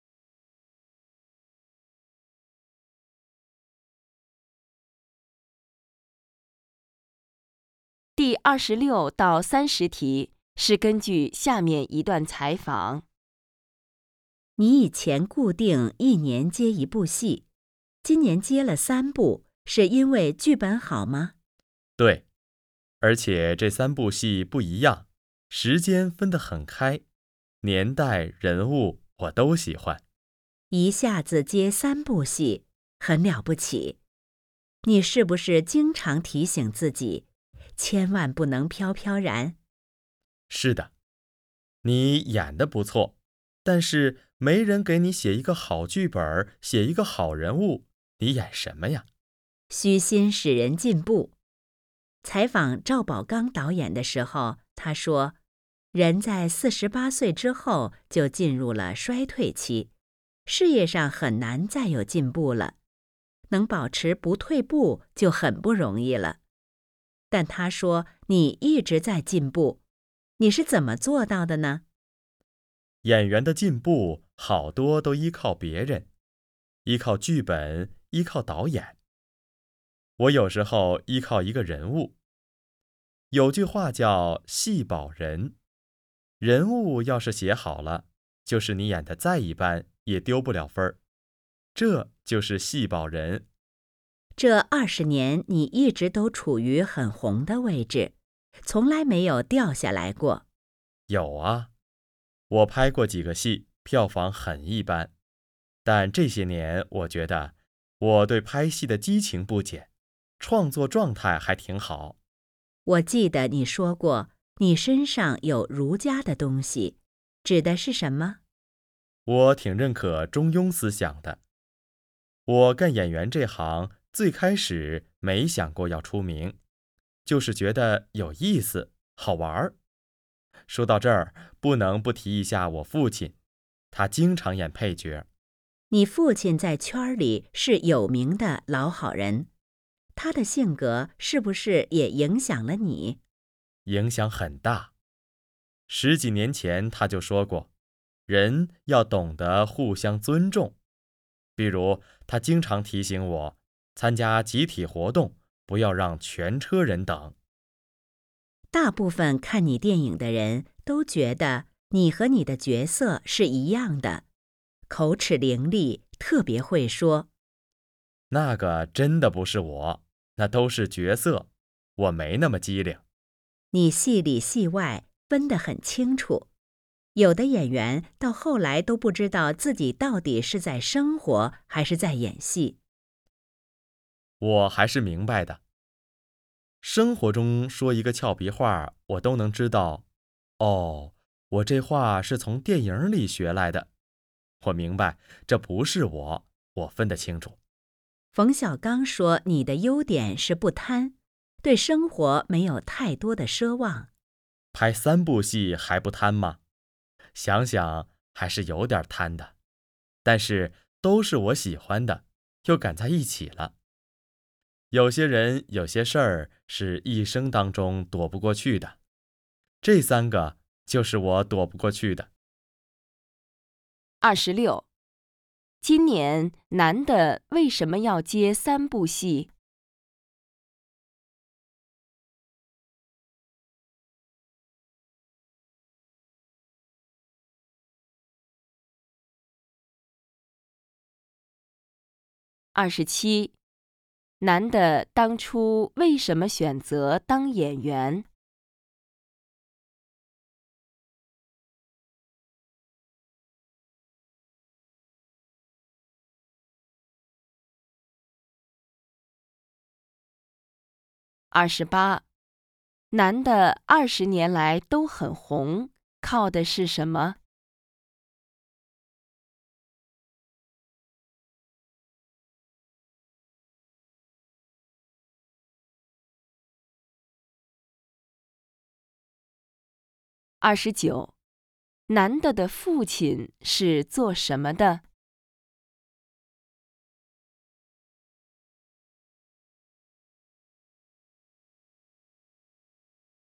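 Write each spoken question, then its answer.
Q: 今年男的为什么要接三部戏?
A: 剧本好,年代和人物他都喜欢

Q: 男的当初为什么选择当演员?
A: 觉得有意思,好玩

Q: 男的的父亲是做什么的?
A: 演员(常演配角)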